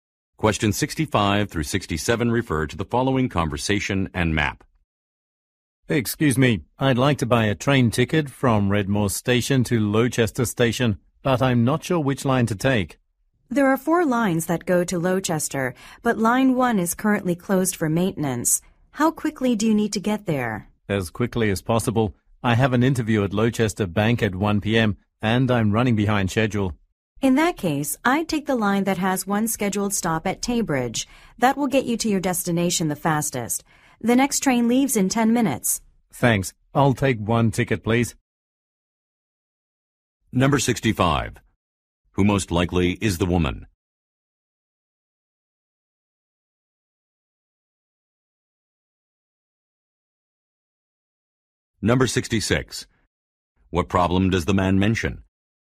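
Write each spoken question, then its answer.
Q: Who most likely is the woman?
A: A train station ticket agent

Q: What problem does the man mention?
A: He is running late for an interview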